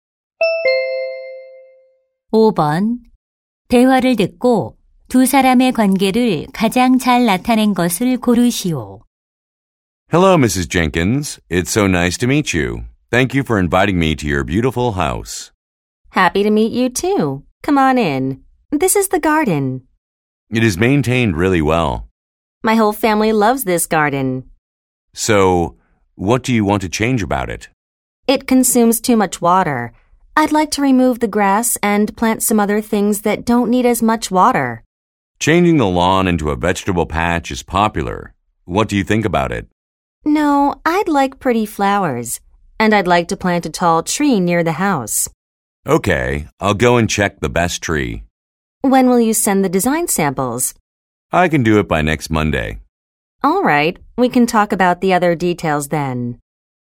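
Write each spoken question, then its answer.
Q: 대화를 듣고 두 사람의 관계를 가장 잘 나타낸 것을 고르시오.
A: 집주인 - 정원 디자이너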